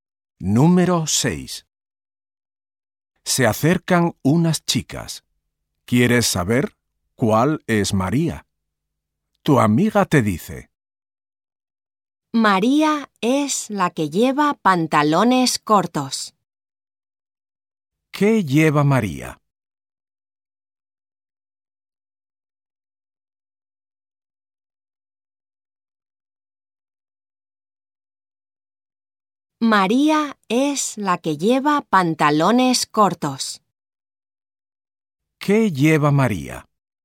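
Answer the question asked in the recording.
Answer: Pantalones cortos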